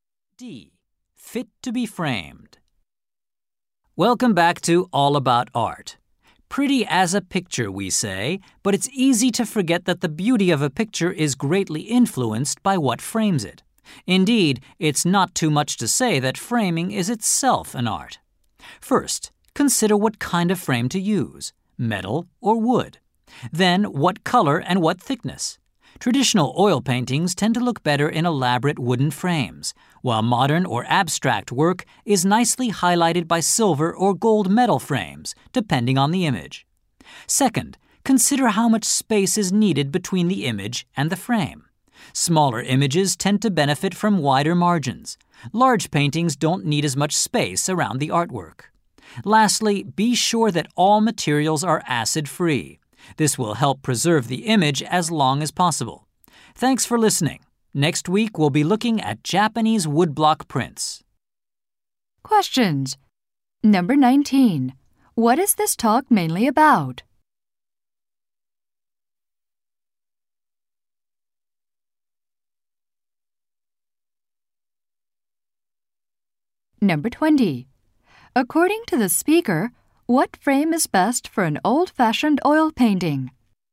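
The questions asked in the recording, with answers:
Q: What is this talk mainly about?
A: How to frame pictures

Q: According to the speaker, what frame is best for an old-fashioned oil painting?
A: An elaborate wooden frame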